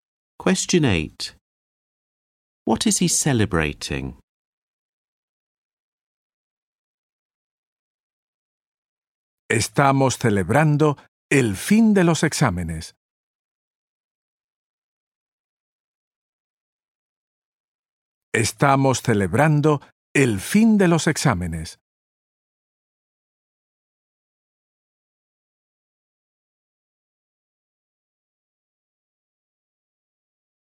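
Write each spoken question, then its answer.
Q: What is he celebrating?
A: The end of the exams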